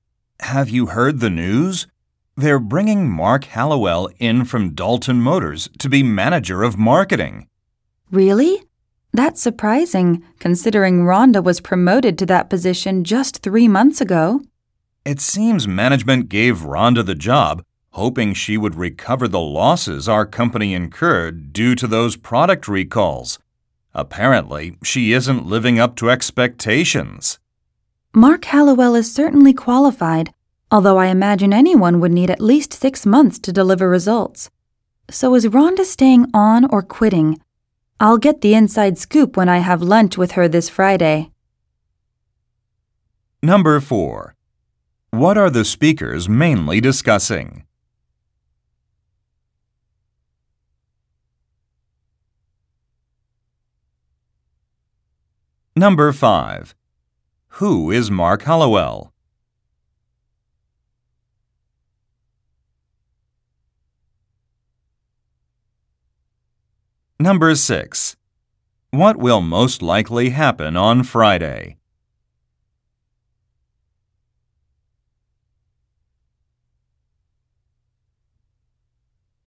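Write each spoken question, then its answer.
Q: What are the speakers mainly discussing?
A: A change of marketing manager: Mark Hallowell is replacing Rhonda

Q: Who is Mark Hallowell?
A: Someone from Dalton Motors who will be the new marketing manager

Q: What will most likely happen on Friday?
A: The speaker will have lunch with Rhonda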